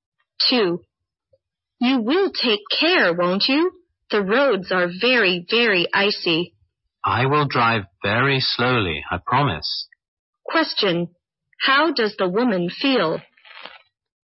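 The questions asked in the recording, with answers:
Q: How does the woman feel?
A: Worried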